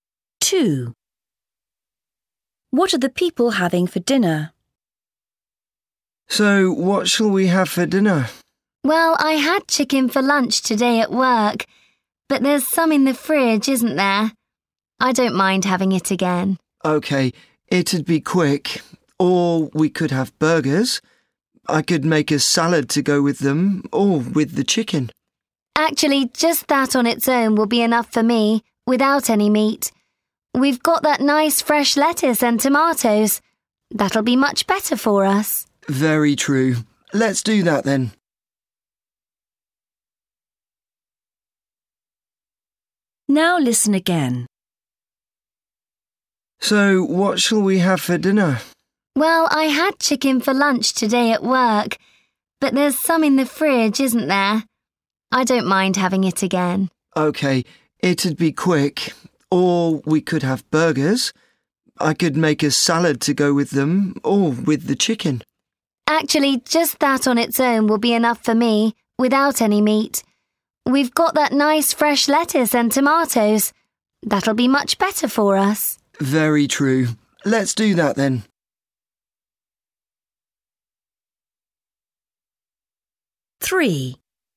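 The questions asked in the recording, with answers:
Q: What are the people having for dinner?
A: Salad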